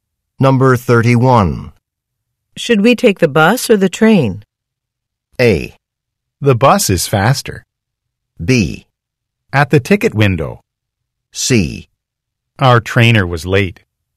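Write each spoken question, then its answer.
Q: Should we take the bus or the train?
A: A: The bus is faster.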